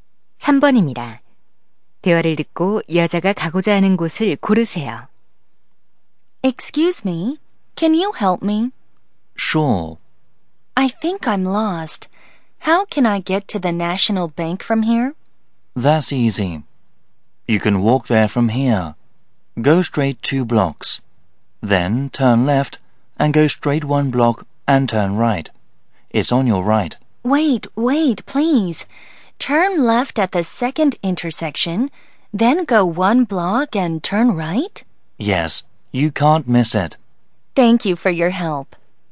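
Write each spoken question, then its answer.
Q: 대화를 듣고 여자가 가고자 하는 곳을 고르세요.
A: National Bank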